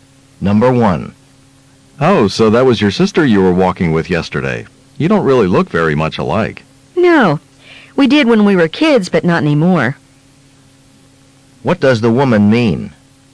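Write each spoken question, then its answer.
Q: What does the woman mean?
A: She and her sister looked alike as children but no longer do.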